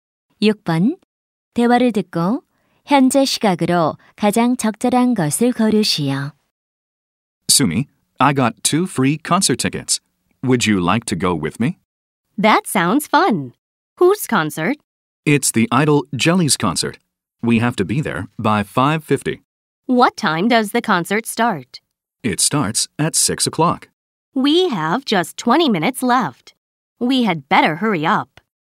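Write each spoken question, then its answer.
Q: 대화를 듣고 현재 시각으로 가장 적절한 것을 고르시오.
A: 5시 30분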